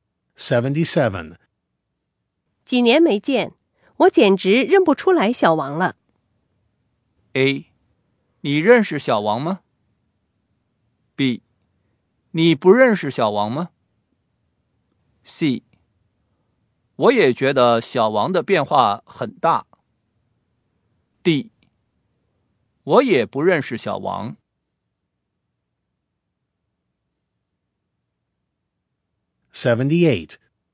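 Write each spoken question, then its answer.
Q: 几年没见,我简直认不出来小王了。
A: C: 我也觉得小王的变化很大。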